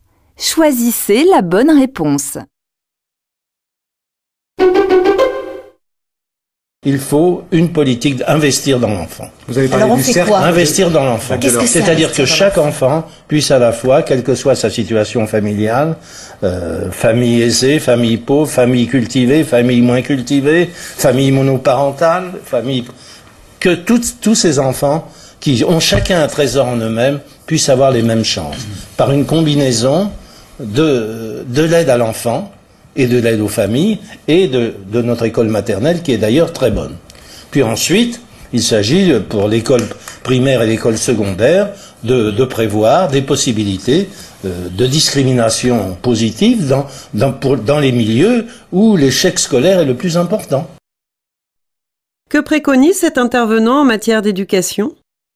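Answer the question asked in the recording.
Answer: Investir dans l'enfant pour que tous les enfants aient les mêmes chances, avec de la discrimination positive là où l'échec scolaire est le plus important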